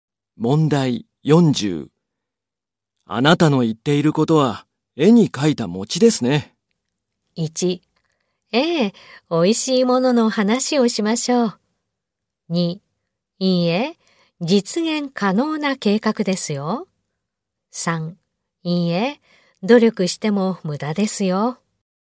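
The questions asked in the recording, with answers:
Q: あなたの言っていることは、絵に描いた餅ですね。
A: 2: いいえ、実現可能な計画ですよ。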